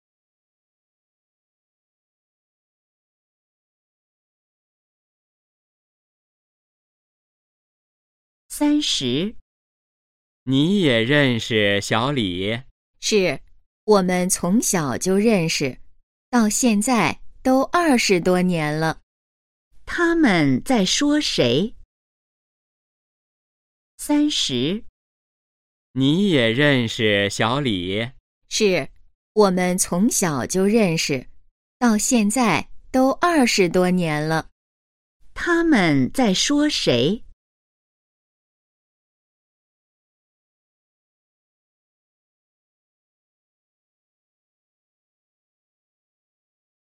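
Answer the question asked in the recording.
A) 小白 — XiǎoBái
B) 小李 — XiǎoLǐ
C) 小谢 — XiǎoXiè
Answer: B) 小李 — XiǎoLǐ

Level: HSK2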